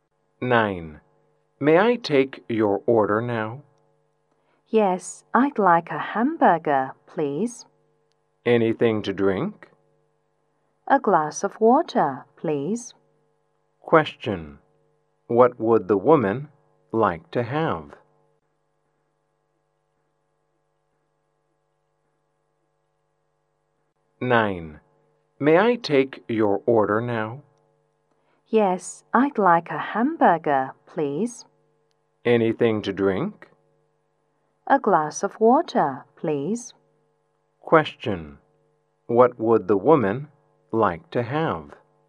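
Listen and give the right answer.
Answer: A hamburger and a glass of water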